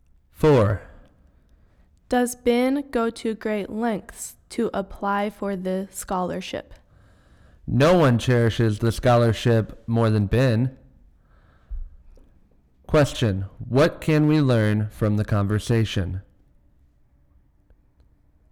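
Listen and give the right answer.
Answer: Ben values the scholarship very much and tries hard to get it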